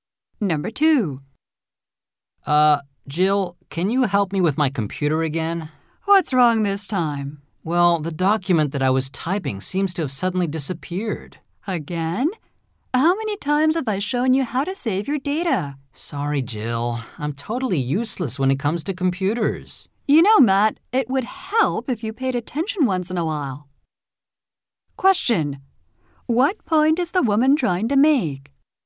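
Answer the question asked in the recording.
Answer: The man should pay more attention when she shows him how to save his data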